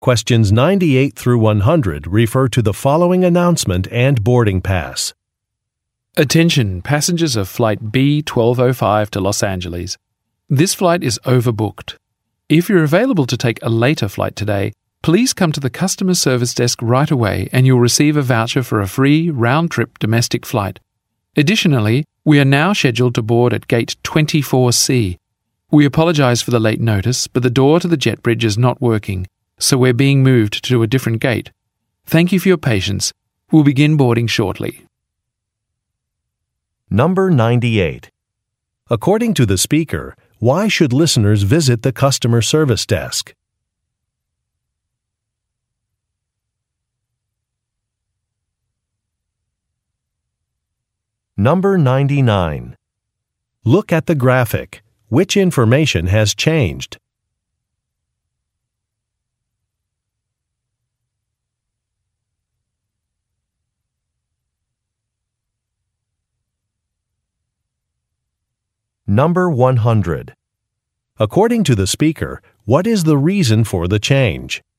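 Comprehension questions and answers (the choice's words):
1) According to the speaker, why should listeners visit the customer service desk?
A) To claim a lost item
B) To check extra baggage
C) To request a special meal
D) To volunteer for a later flight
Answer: To volunteer for a later flight

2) According to the speaker, what is the reason for the change?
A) Some workers are late.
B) A door is broken.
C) The weather is bad.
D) A computer is malfunctioning.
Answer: A door is broken.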